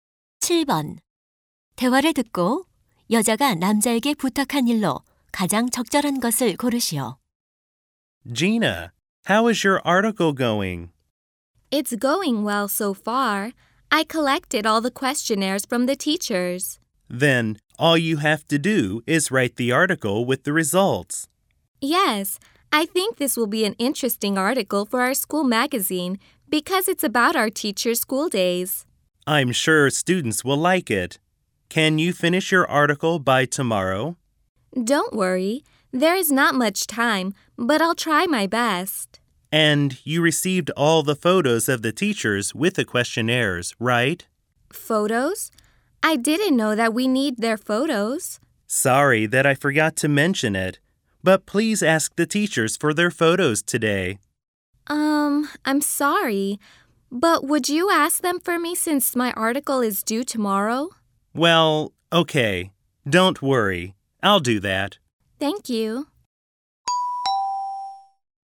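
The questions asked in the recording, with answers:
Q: 대화를 듣고 여자가 남자에게 부탁한 일로 가장 적절한 것을 고르시오.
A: 선생님들께 사진 요청하기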